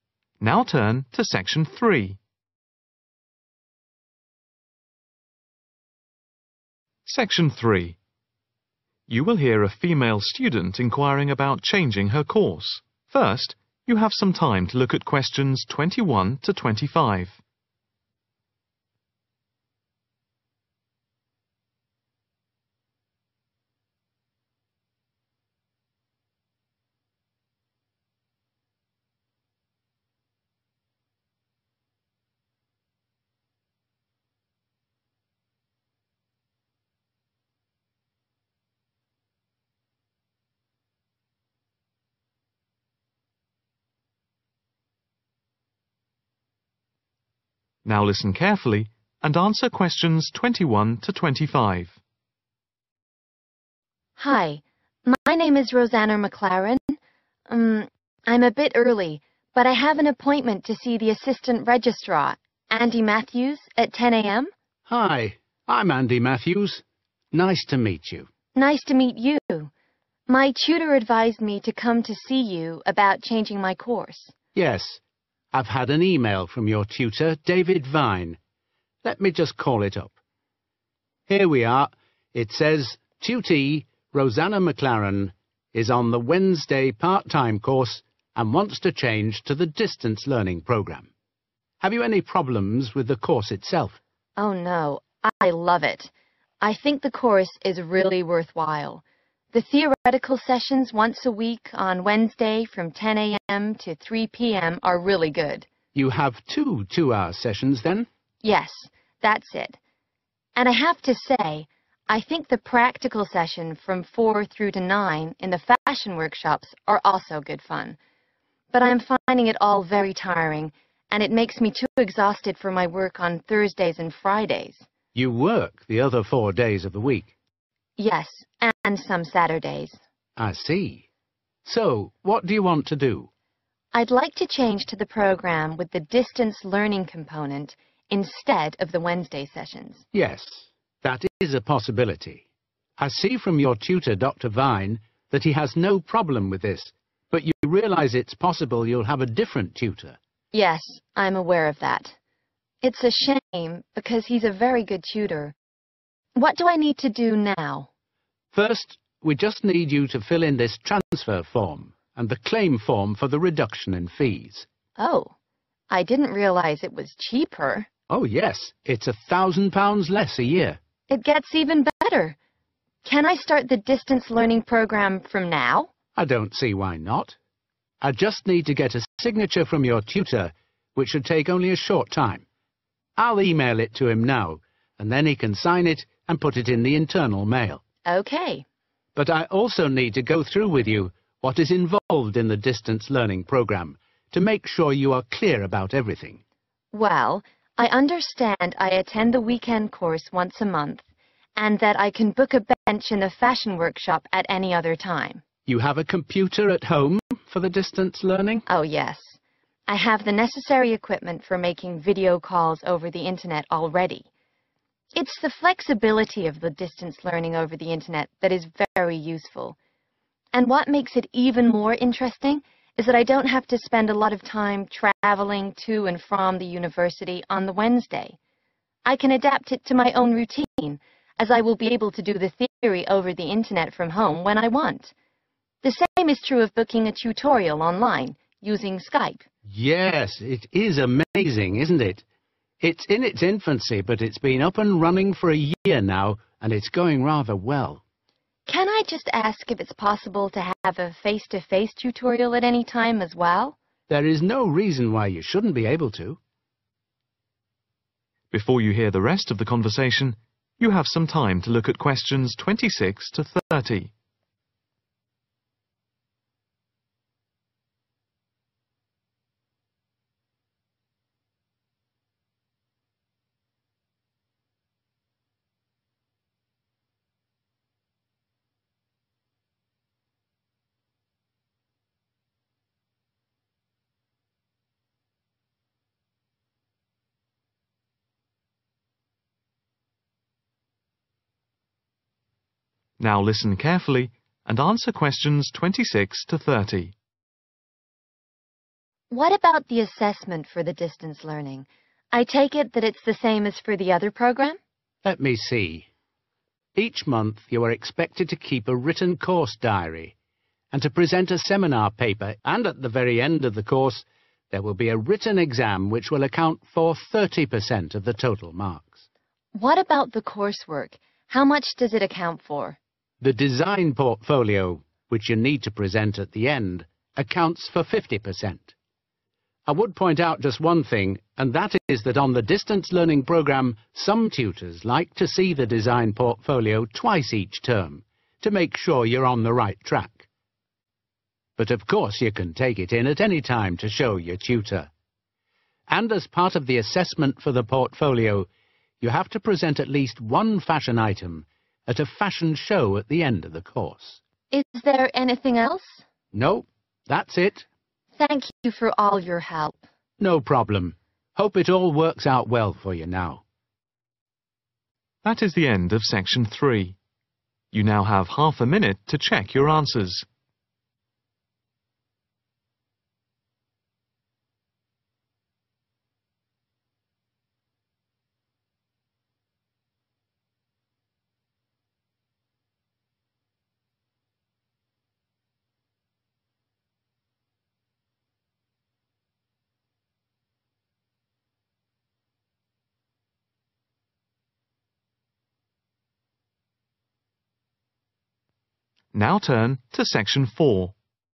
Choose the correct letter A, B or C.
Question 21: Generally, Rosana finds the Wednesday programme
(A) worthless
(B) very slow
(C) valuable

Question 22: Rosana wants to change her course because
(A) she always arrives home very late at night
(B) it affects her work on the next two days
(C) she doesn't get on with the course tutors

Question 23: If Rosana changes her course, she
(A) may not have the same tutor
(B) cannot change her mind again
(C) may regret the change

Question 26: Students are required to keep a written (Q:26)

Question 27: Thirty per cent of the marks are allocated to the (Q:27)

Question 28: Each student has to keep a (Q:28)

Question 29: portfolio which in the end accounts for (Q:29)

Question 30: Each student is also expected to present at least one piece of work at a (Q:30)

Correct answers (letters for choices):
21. C
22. B
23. A
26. course diary
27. written exam
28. design
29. 50%
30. fashion show